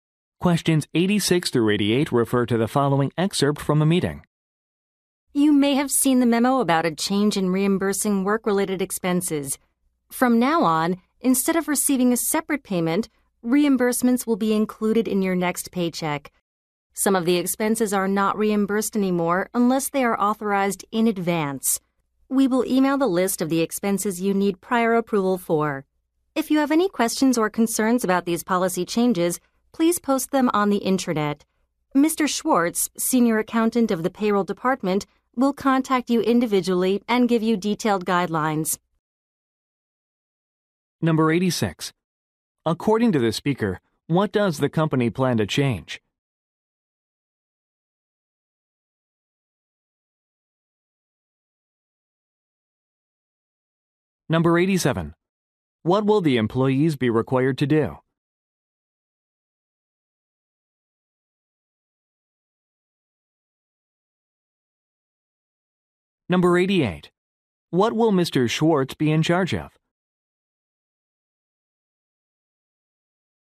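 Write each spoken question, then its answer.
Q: According to the speaker, what does the company plan to change?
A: How work expenses are reimbursed

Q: What will the employees be required to do?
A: Get approval in advance for some expenses

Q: What will Mr. Schwartz be in charge of?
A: Contacting employees individually with detailed guidelines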